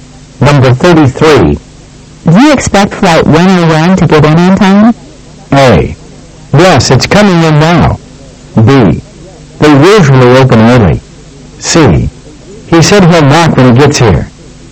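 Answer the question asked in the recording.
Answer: A: Yes, it's coming in now.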